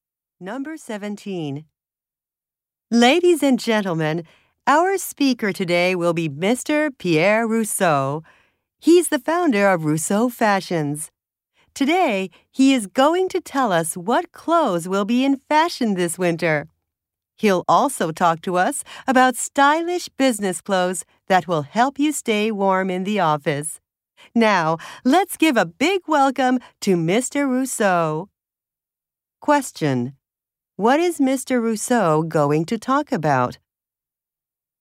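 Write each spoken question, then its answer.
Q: Rousseau going to talk about?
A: Winter fashions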